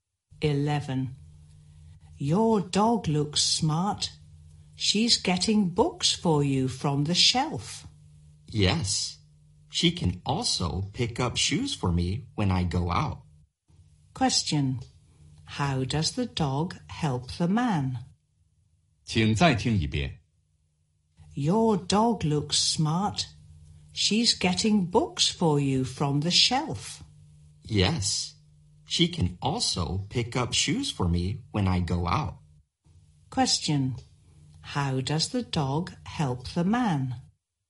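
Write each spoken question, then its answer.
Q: How does the dog help the man?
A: She gets books from the shelf and picks up shoes for him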